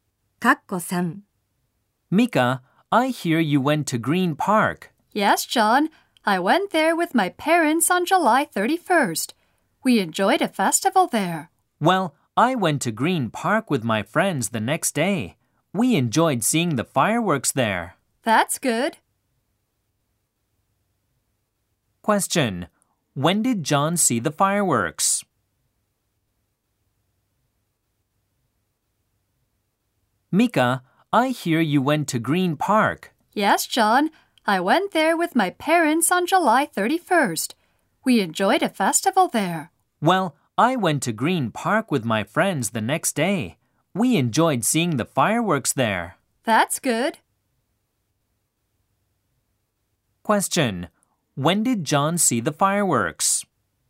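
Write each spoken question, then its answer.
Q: When did John see the fireworks?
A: On August 1st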